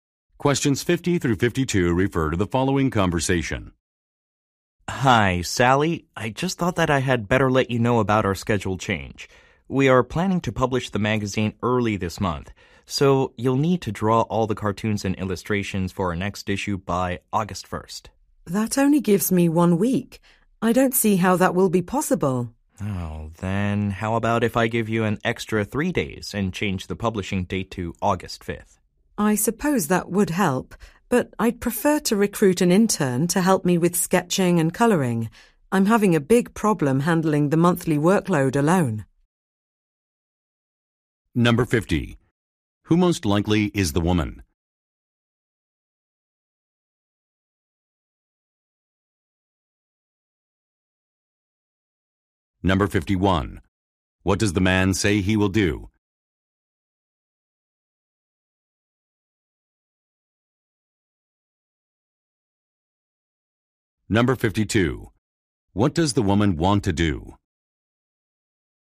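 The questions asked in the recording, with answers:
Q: Who most likely is the woman?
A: An illustrator

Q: What does the man say he will do?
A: Give her an extra 3 days by changing the publishing date

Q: What does the woman want to do?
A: Recruit an intern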